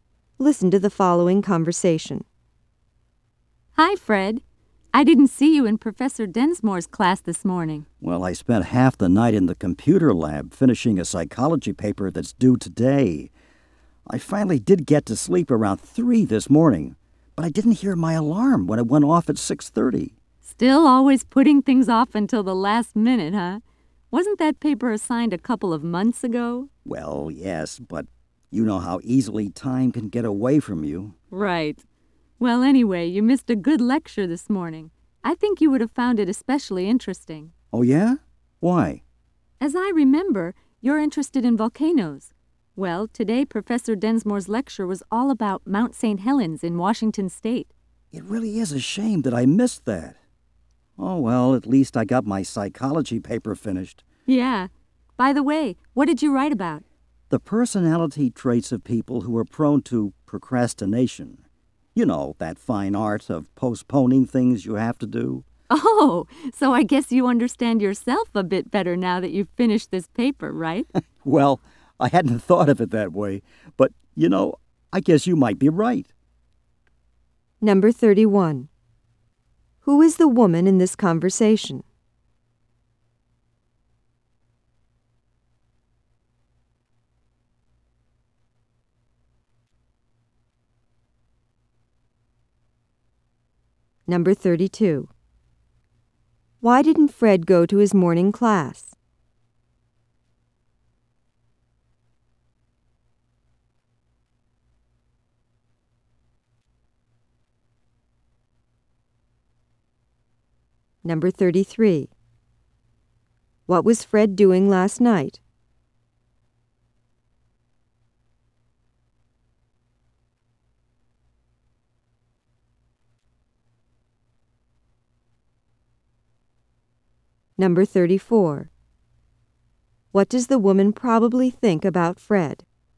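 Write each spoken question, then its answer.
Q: Why didn't Fred go to his morning class?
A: He overslept; he didn't hear his alarm after staying up late

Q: What was Fred doing last night?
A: Finishing a psychology paper in the computer lab

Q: What does the woman probably think about Fred?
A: He is a procrastinator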